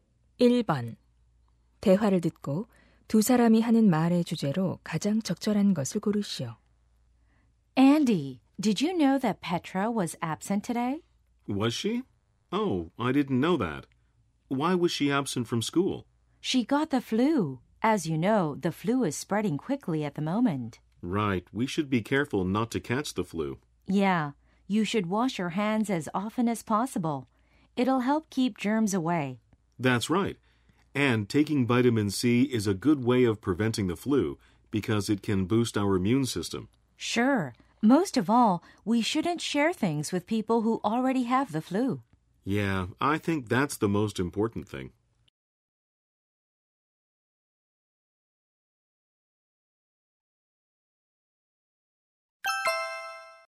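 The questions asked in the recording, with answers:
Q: 1번 대화를 듣고 두 사람이 하는 말의 주제로 가장 적절한 것을 고르시오.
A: 독감 예방법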